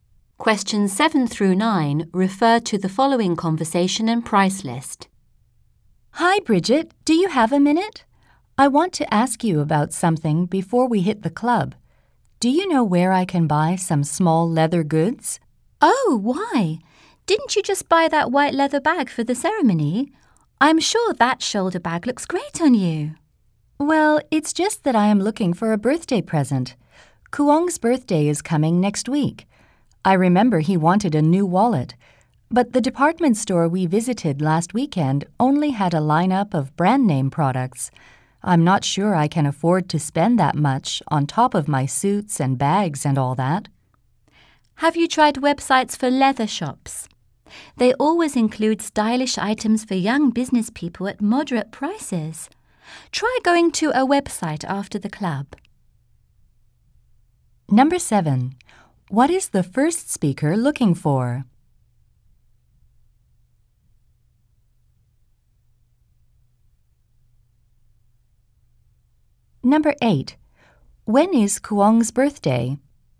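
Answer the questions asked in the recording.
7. A wallet (small leather goods) as a birthday present
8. Next week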